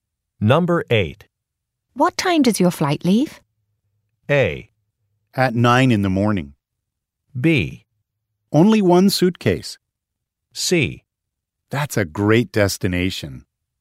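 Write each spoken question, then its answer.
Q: What time does your flight leave?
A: A: At 9 in the morning.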